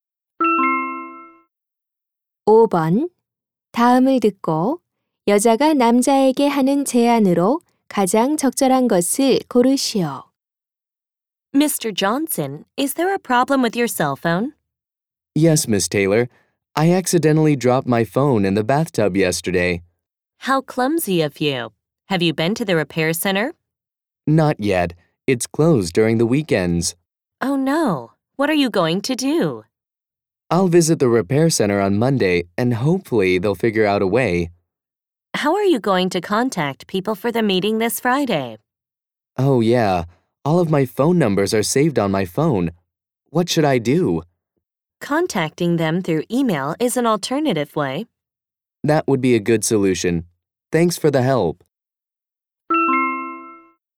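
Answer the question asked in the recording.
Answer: 이메일로 사람들에게 연락하기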